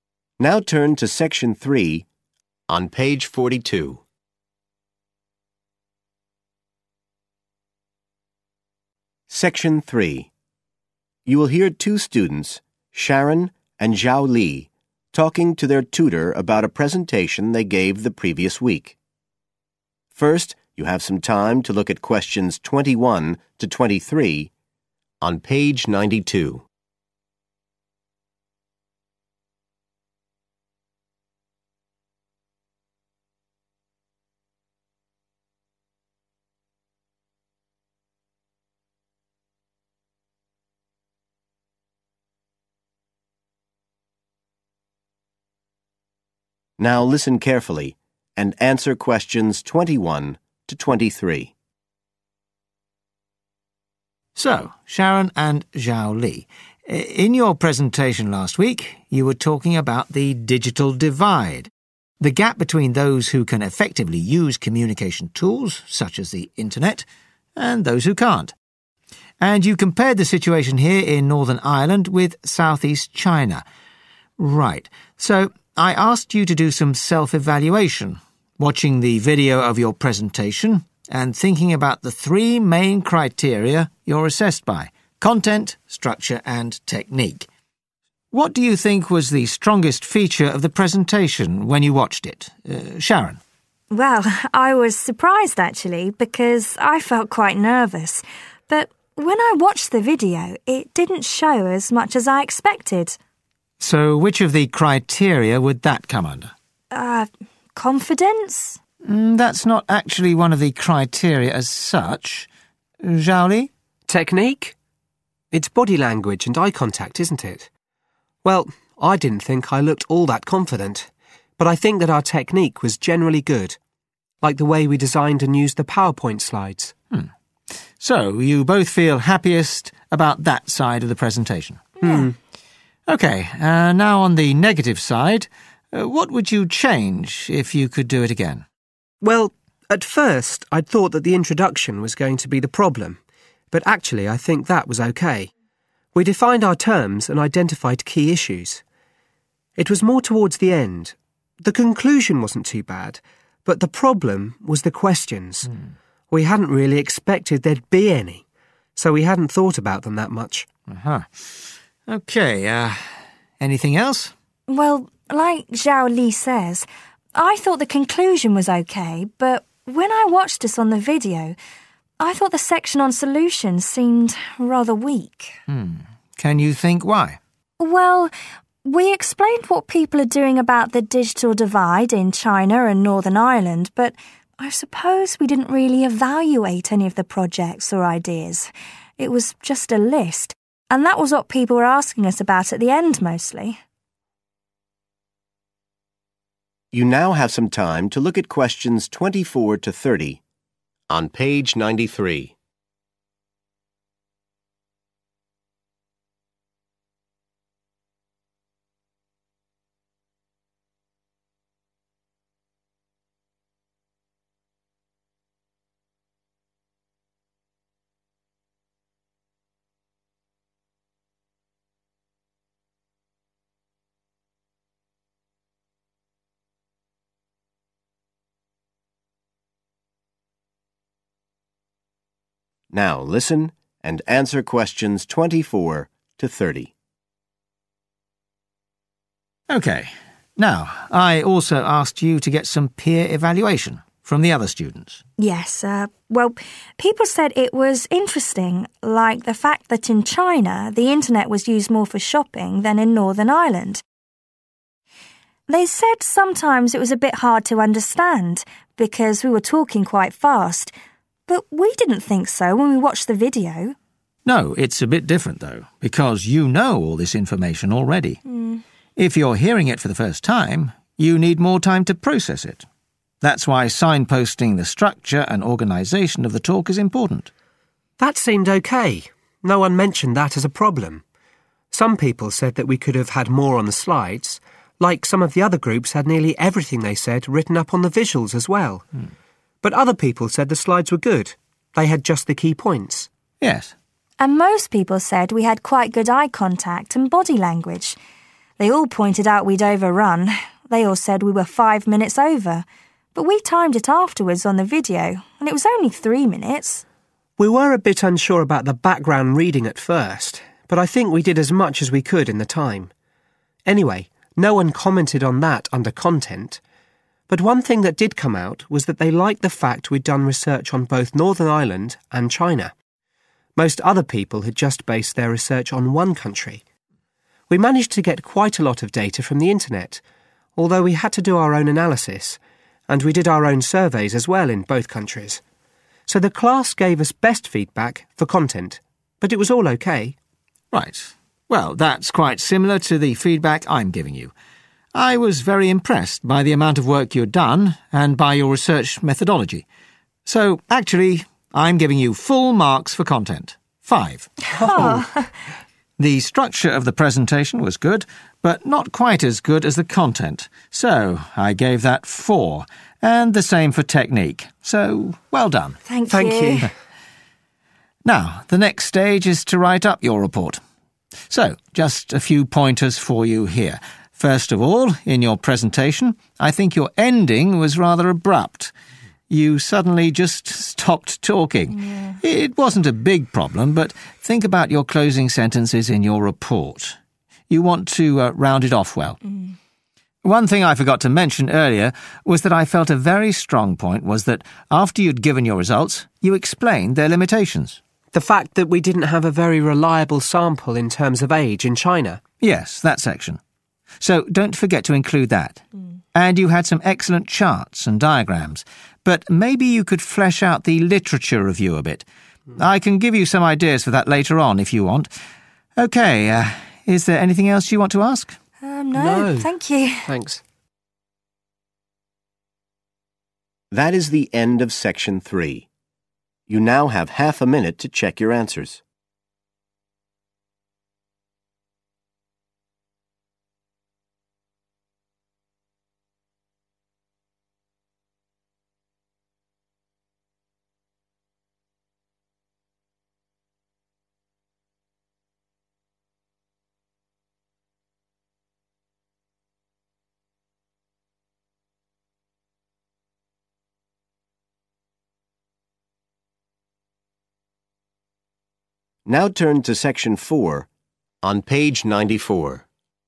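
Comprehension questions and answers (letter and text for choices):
Answer the questions below. Write NO MORE THAN THREE WORDS for each answer.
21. What do Sharon and Xiao Li agree was the strongest aspect of their presentation?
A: technique

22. Which part of their presentation was Xiao Li least happy with?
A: the questions

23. Which section does Sharon feel they should have discussed in more depth?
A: solutions

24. Sharon and Xiao Li were surprised when the class said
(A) they spoke too quickly.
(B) they included too much information.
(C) their talk was not well organised.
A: (A) they spoke too quickly.

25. The class gave Sharon and Xiao Li conflicting feedback on their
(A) timing.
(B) use of visuals.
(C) use of eye contact.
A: (B) use of visuals.

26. The class thought that the presentation was different from the others because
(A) the analysis was more detailed.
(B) the data collection was more wide-ranging.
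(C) the background reading was more extensive.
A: (B) the data collection was more wide-ranging.

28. The tutor says that the...............of the presentation seemed rather sudden.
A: ending

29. The tutor praises the students' discussion of the..............of their results.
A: limitations

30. The tutor suggests that they could extend the..............review in their report.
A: literature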